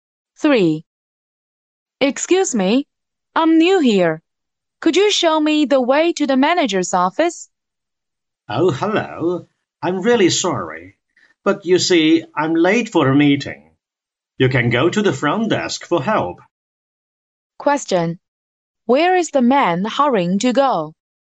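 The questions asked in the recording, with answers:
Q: Where is the man hurrying to go?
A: To a meeting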